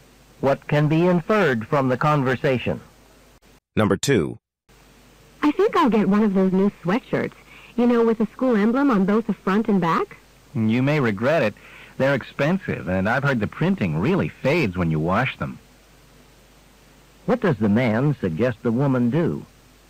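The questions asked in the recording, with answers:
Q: What does the man suggest the woman do?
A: Not buy the sweatshirt.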